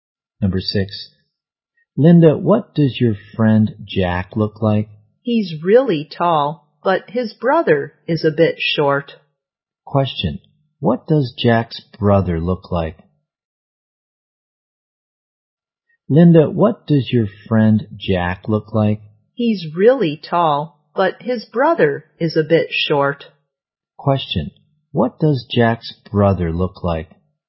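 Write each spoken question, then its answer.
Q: Question, what does Jack's brother look like?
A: A bit short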